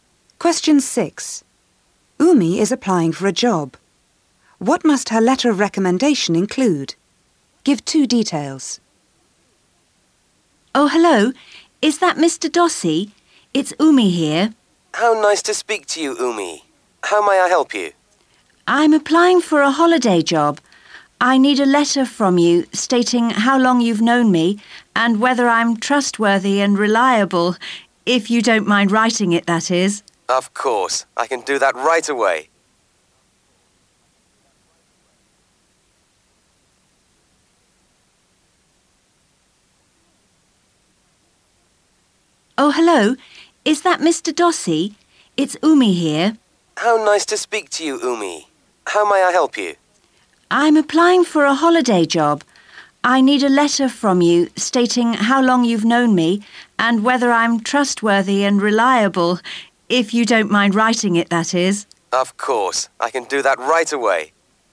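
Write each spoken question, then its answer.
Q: What must her letter of recommendation include?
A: How long he has known her, and whether she is trustworthy and reliable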